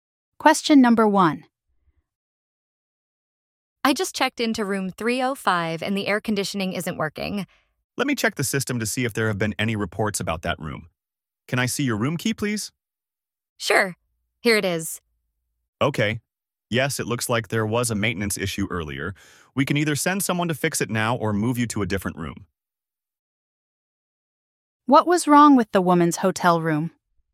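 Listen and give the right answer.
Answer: The air conditioning wasn't working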